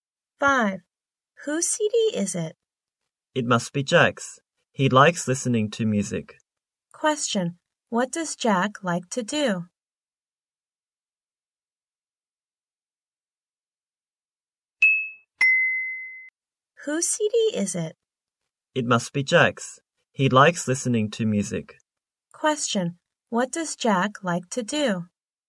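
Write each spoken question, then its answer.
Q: What does Jack like to do?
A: Listening to music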